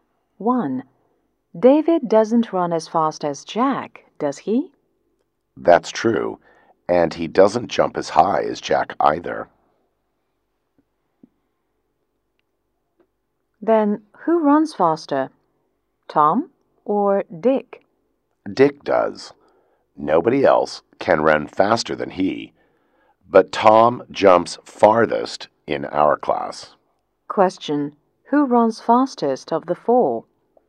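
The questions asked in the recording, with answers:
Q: who runs fastest of the four?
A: Dick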